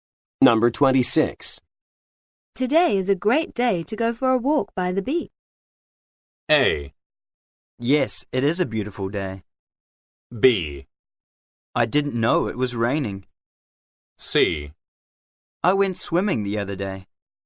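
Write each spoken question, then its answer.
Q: Today is a great day to go for a walk by the beach.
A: A: Yes, it is a beautiful day.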